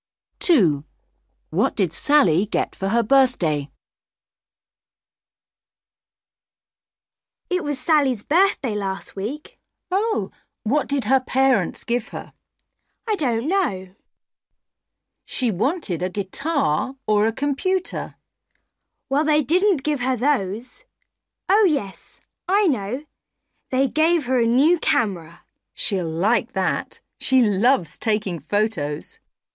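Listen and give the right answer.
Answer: a camera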